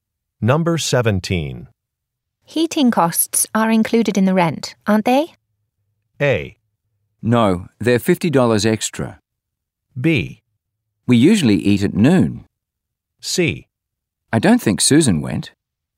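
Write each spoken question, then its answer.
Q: Heating costs are included in the rent, aren't they?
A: A: No, they're $50 extra.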